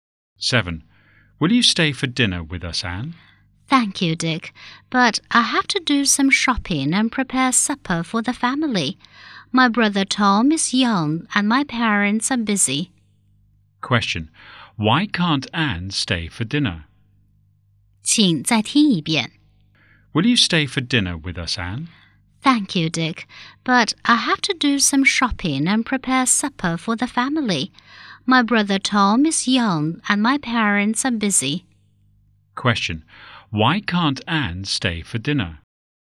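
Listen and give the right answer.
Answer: She has to do some shopping and prepare supper for her family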